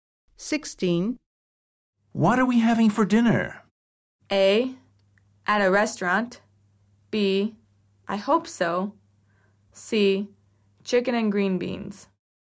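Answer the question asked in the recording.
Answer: C: Chicken and green beans.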